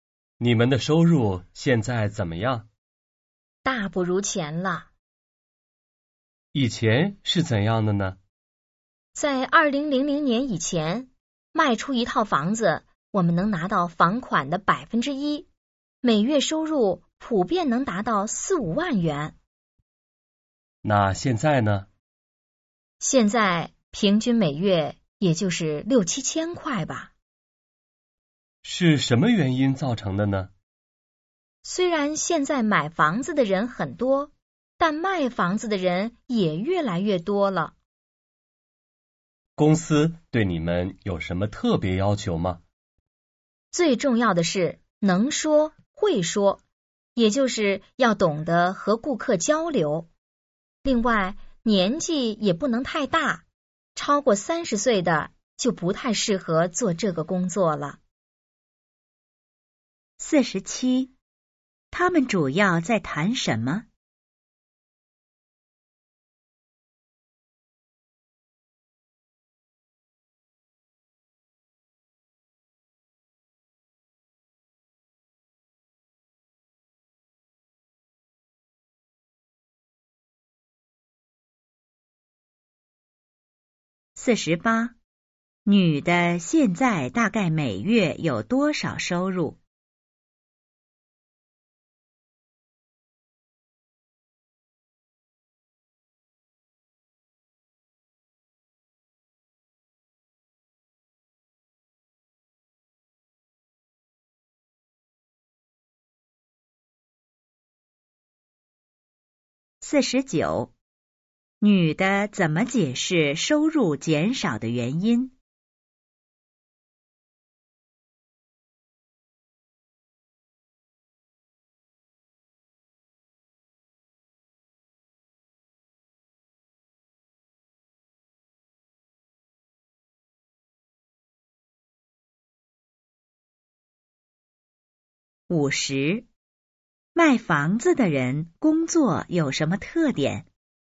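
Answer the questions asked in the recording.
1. 卖房子的人的收入
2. 六七千块
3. 卖房子的人越来越多了
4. 要能说会说,年纪不能太大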